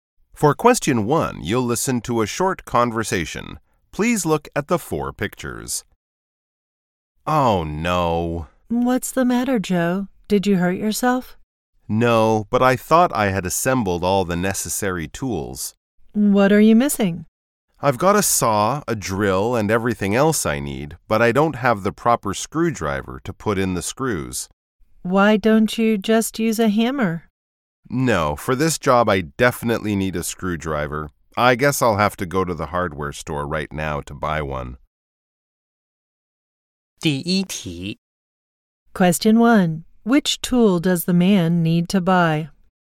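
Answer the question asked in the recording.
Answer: A screwdriver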